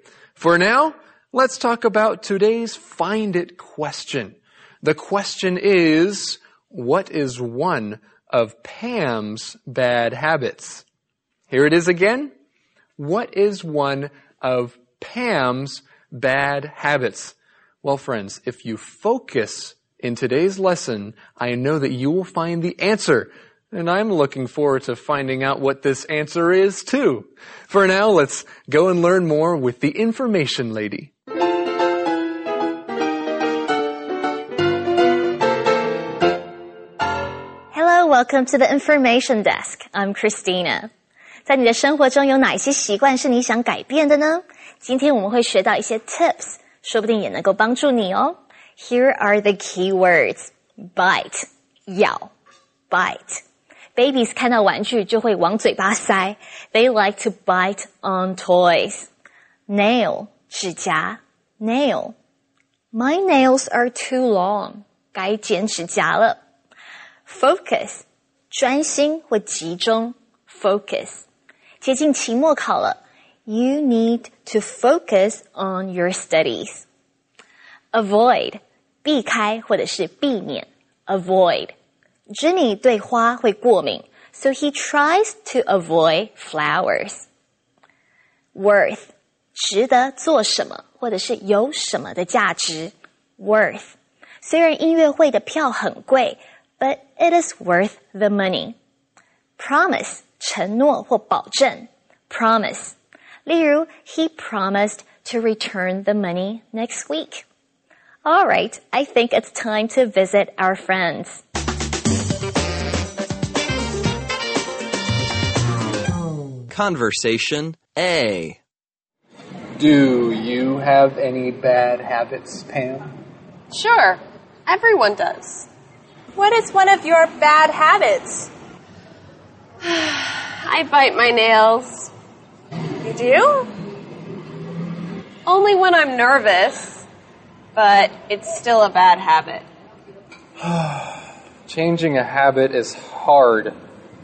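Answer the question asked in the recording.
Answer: She bites her nails.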